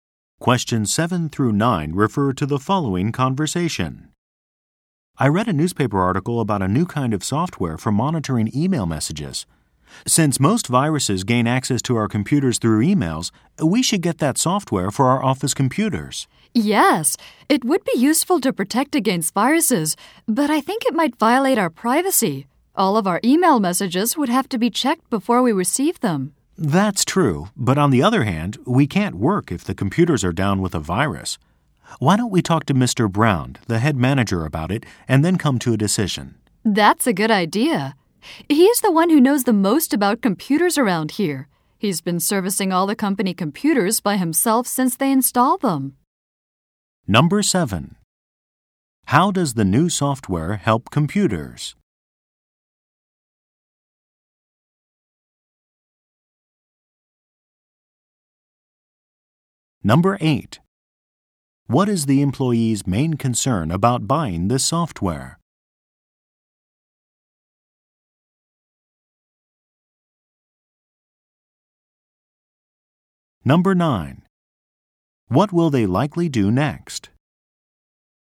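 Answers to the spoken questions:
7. It monitors emails to protect against viruses
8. It might violate their privacy
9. Talk to Mr. Brown, the head manager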